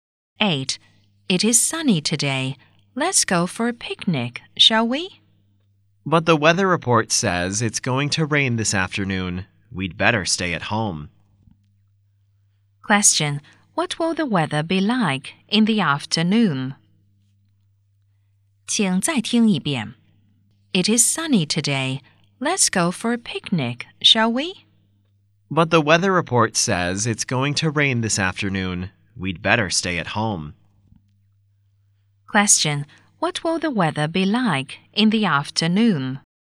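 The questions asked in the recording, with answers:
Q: What will the weather be like in the afternoon?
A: Rainy.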